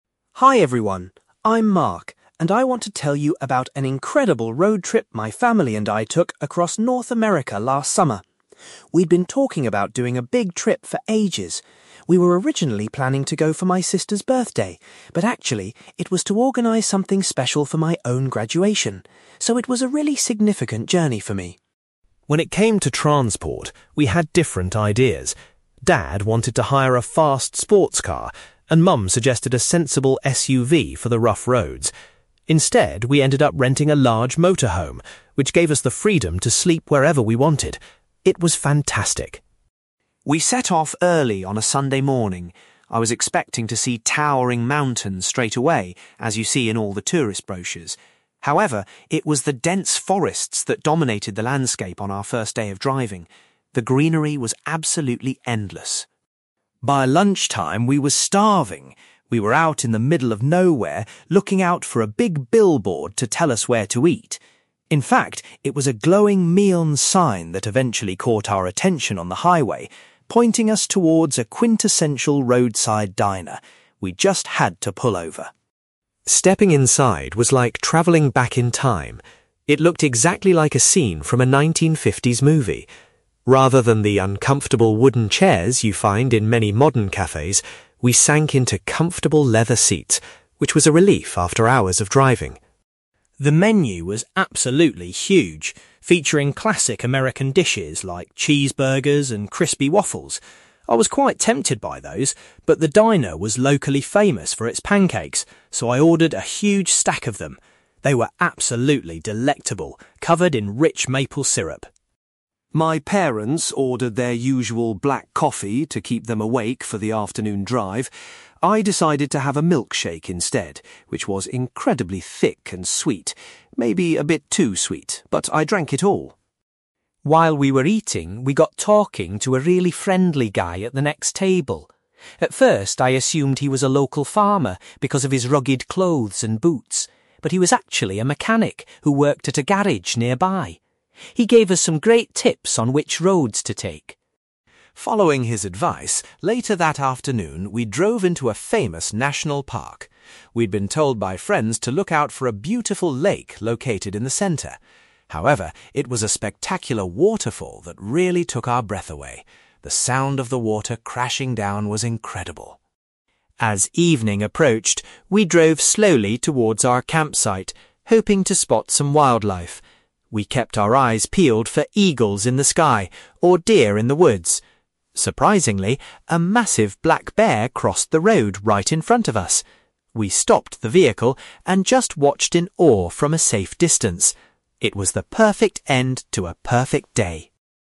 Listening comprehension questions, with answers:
You will hear a boy called Mark giving a presentation about a family road trip he went on in North America. For questions 9-18, complete the sentences with a word or short phrase.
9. The main purpose of the trip was to celebrate Mark's (9)........................... .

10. The family decided to travel in a (10)........................... rather than the vehicles his parents wanted.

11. On the initial day of their journey, they were surrounded by (11)........................... .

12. Mark says that a (12)........................... directed them to a place to get food.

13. Mark was pleased that the diner had (13)........................... to sit on.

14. Despite other options on the menu, Mark decided to try the (14)........................... .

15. Mark chose a sweet (15)........................... to drink with his meal.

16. The man they chatted with inside the diner worked as a (16)........................... .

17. Inside the national park, the family was highly impressed by a (17)........................... .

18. Mark was amazed when they suddenly saw a (18)........................... on the road.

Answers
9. graduation
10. motorhome
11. forests
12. neon sign
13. leather seats
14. pancakes
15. milkshake
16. mechanic
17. waterfall
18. black bear

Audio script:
Mark: Hi everyone! I'm Mark, and I want to tell you about an incredible road trip my family and I took across North America last summer. We'd been talking about doing a big trip for ages. We were originally planning to go for my sister's birthday, but actually, it was to organise something special for my own graduation. So, it was a really significant journey for me.
When it came to transport, we had different ideas. Dad wanted to hire a fast sports car, and Mum suggested a sensible SUV for the rough roads. Instead, we ended up renting a large motorhome, which gave us the freedom to sleep wherever we wanted. It was fantastic.
We set off early on a Sunday morning. I was expecting to see towering mountains straight away, as you see in all the tourist brochures. However, it was the dense forests that dominated the landscape on our first day of driving. The greenery was absolutely endless.
By lunchtime, we were starving. We were out in the middle of nowhere, looking out for a big billboard to tell us where to eat. In fact, it was a glowing neon sign that eventually caught our attention on the highway, pointing us towards a quintessential roadside diner. We just had to pull over.
Stepping inside was like travelling back in time. It looked exactly like a scene from a 1950s movie. Rather than the uncomfortable wooden chairs you find in many modern cafes, we sank into comfortable leather seats, which was a relief after hours of driving.
The menu was absolutely huge, featuring classic American dishes like cheeseburgers and crispy waffles. I was quite tempted by those, but the diner was locally famous for its pancakes, so I ordered a huge stack of them. They were absolutely delectable, covered in rich maple syrup.
My parents ordered their usual black coffee to keep them awake for the afternoon drive. I decided to have a milkshake instead, which was incredibly thick and sweet, maybe a bit too sweet, but I drank it all!
While we were eating, we got talking to a really friendly guy at the next table. At first, I assumed he was a local farmer because of his rugged clothes and boots, but he was actually a mechanic who worked at a garage nearby. He gave us some great tips on which roads to take.
Following his advice, later that afternoon, we drove into a famous national park. We'd been told by friends to look out for a beautiful lake located in the centre. However, it was a spectacular waterfall that really took our breath away. The sound of the water crashing down was incredible.
As evening approached, we drove slowly towards our campsite, hoping to spot some wildlife. We kept our eyes peeled for eagles in the sky or deer in the woods. Surprisingly, a massive black bear crossed the road right in front of us! We stopped the vehicle and just watched in awe from a safe distance. It was the perfect end to a perfect day.

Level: B2